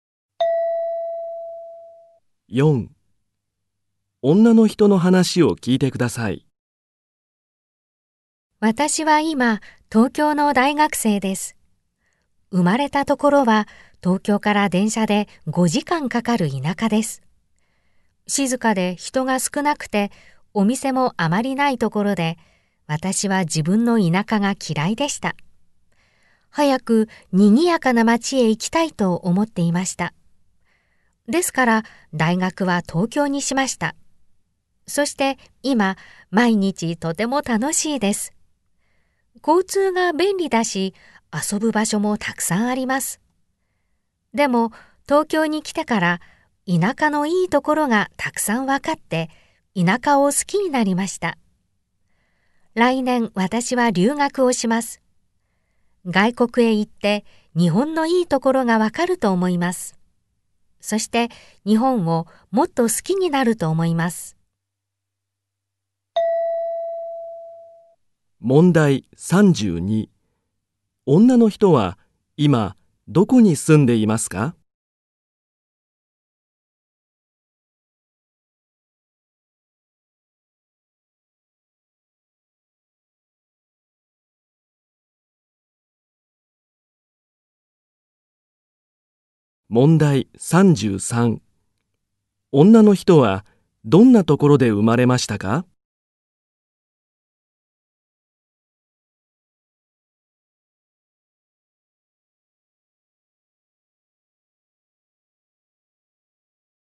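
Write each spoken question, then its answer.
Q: 女の人は今どこに住んでいますか?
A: 東京

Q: 女の人はどんなところで生まれましたか?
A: 静かで人が少ない田舎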